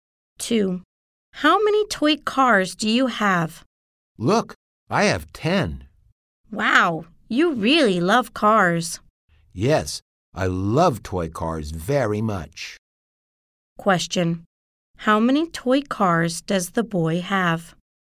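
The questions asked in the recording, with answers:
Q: How many toy cars does the boy have?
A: 10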